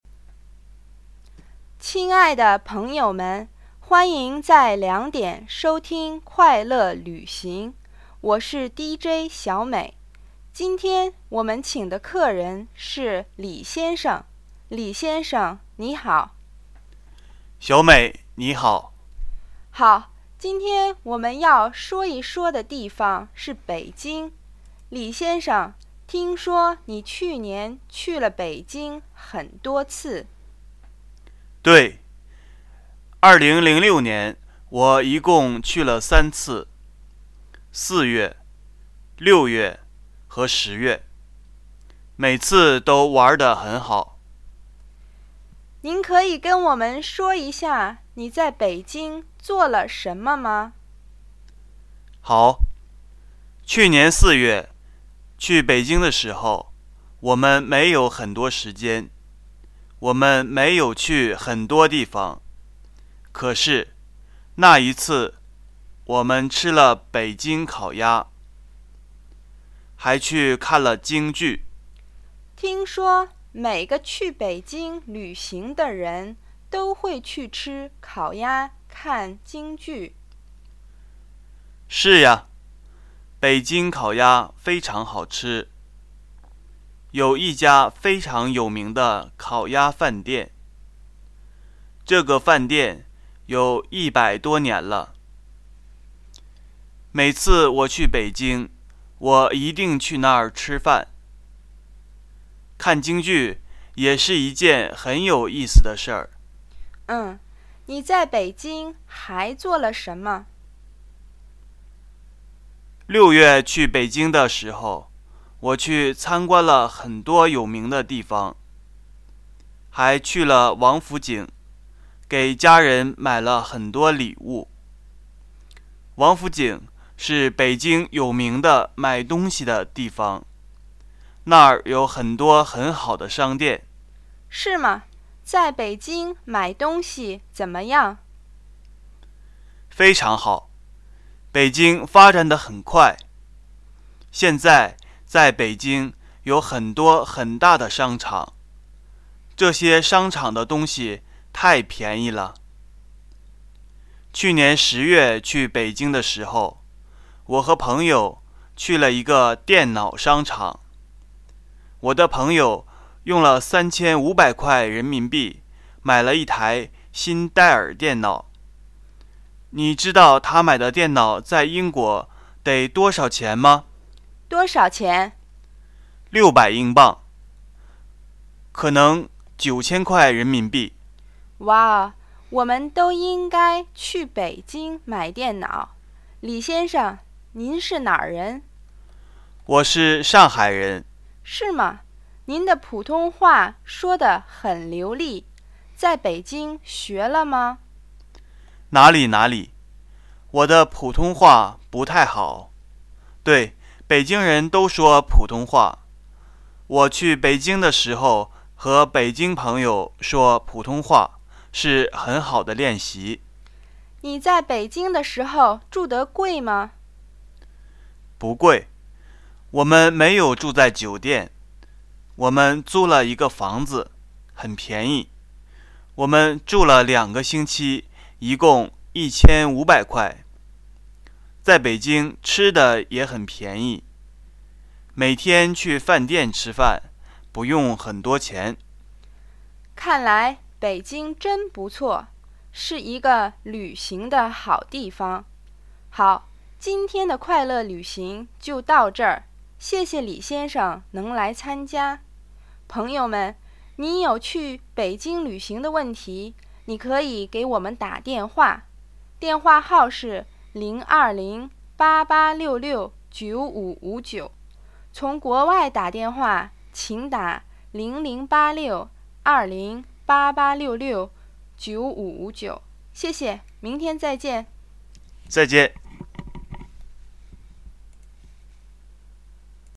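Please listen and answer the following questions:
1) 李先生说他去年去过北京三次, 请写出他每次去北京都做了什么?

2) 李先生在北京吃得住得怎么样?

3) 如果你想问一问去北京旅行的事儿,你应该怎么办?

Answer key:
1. 四月:吃了北京烤鸭,看了京剧;六月:参观了很多有名的地方,去王府井给家人买礼物;十月:和朋友去电脑商场,朋友买了一台电脑
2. 住得不贵,租了一个房子,两个星期一共1500块;吃的也很便宜
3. 给节目打电话,电话号是020-8866-9559(从国外打00862088669559)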